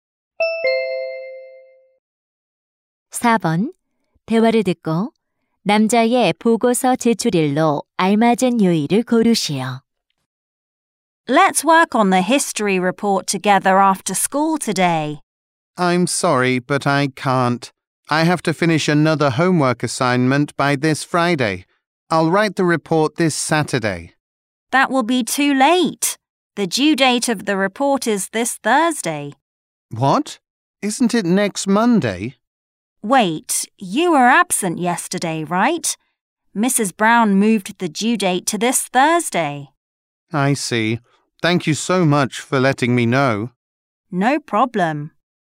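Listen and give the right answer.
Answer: 목요일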